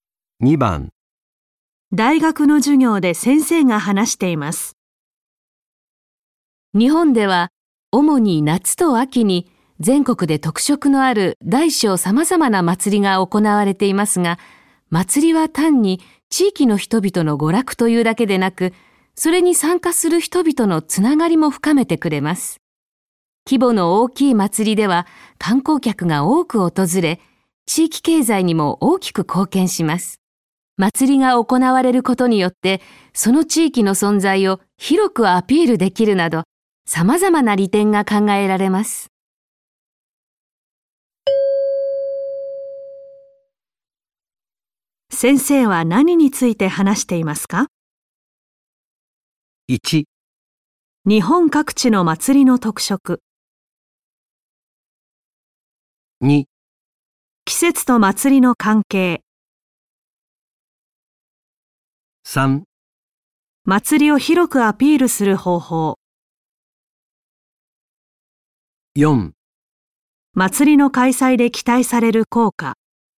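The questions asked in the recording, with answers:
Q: 先生は何について話していますか?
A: 4: 祭りの開催で期待される効果。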